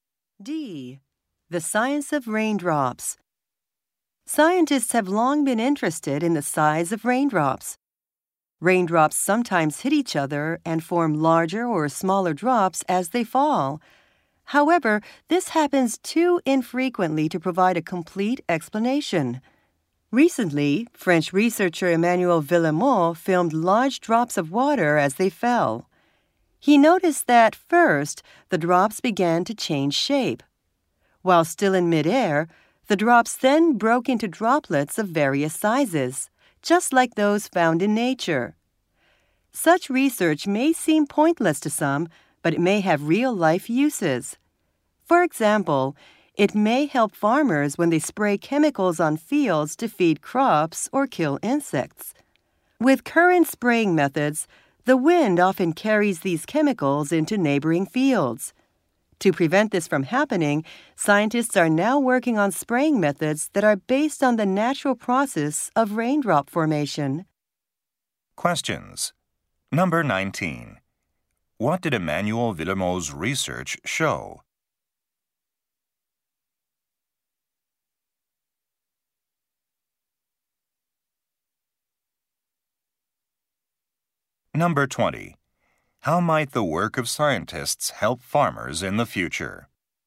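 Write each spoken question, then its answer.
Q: What did Emmanuel Villemot's research show?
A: Falling drops change shape and then break into droplets of different sizes in midair.

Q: How might the work of scientists help farmers in the future?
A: By giving them spraying methods that stop the wind from carrying chemicals into nearby fields.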